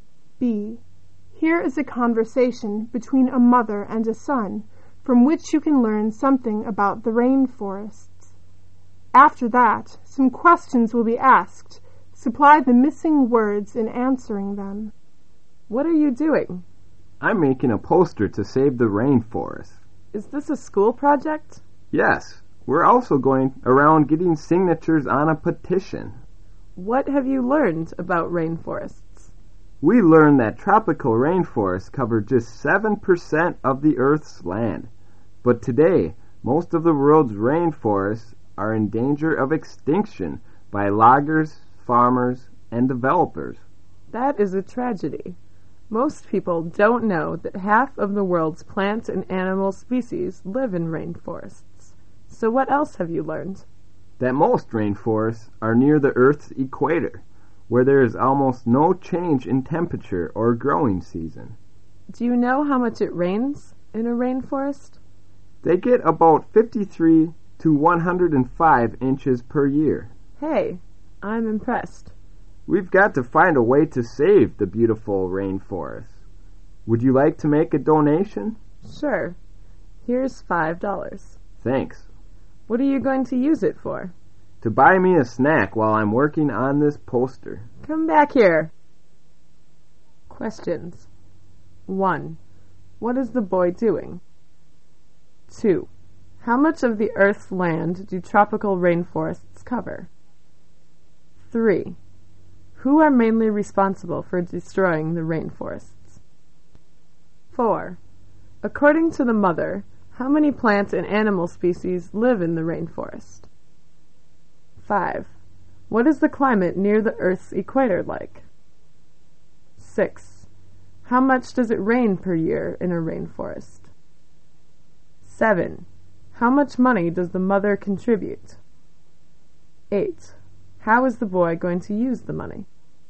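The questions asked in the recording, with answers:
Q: What is the boy doing?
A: Making a poster to save the rainforest

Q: How much of the Earth's land do tropical rainforests cover?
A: Just 7%

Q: Who are mainly responsible for destroying the rainforests?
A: Loggers, farmers and developers

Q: According to the mother, how many plant and animal species live in the rainforest?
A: Half of the world's plant and animal species

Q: What is the climate near the Earth's equator like?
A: Almost no change in temperature or growing season

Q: How much does it rain per year in a rainforest?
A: About 53 to 105 inches

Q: How is the boy going to use the money?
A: To buy himself a snack while working on the poster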